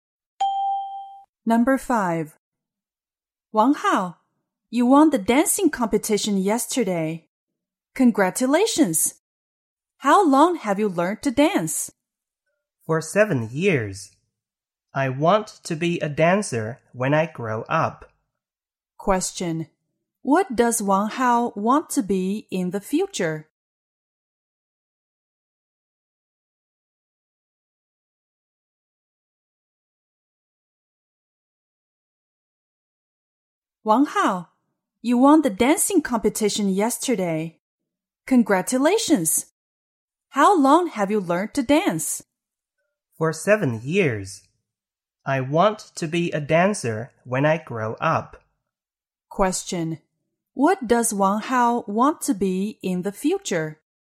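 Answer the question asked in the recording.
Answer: A dancer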